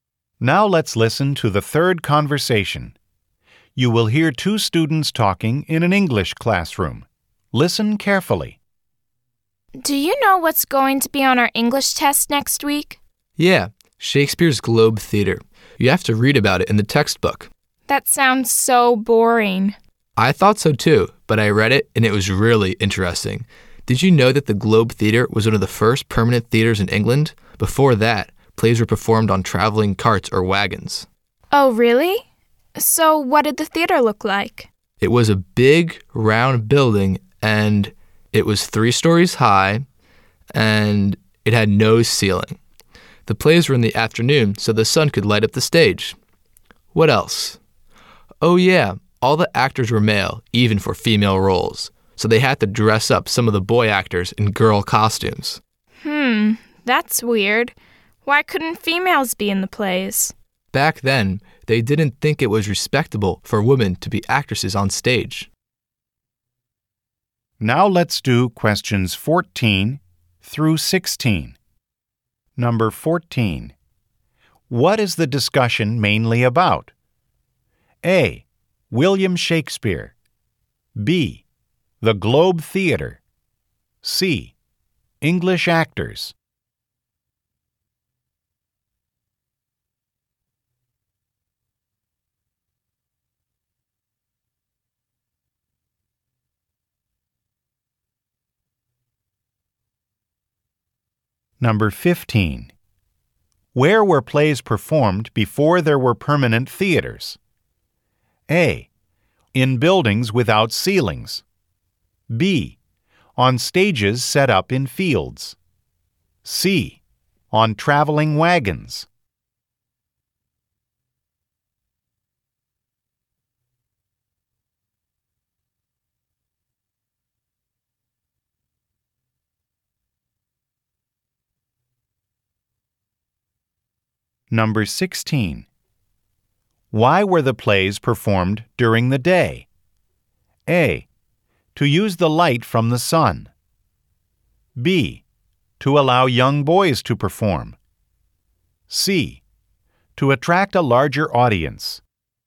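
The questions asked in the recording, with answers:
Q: What is the discussion mainly about?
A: B: The Globe Theater.

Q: Where were plays performed before there were permanent theaters?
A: C: On traveling wagons.

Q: Why were the plays performed during the day?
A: A: To use the light from the sun.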